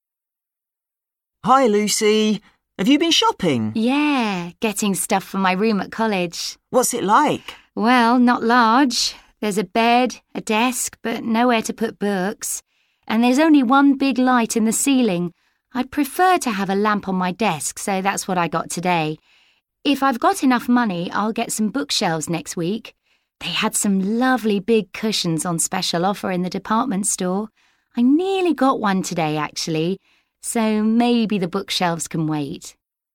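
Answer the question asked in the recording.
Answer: a lamp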